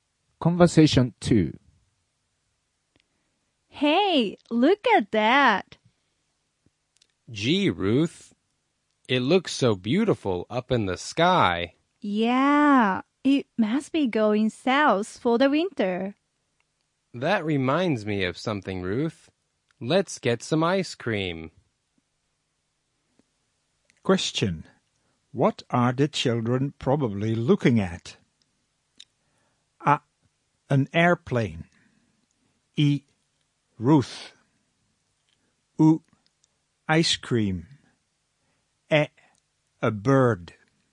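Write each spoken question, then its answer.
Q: What are the children probably looking at?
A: え: A bird.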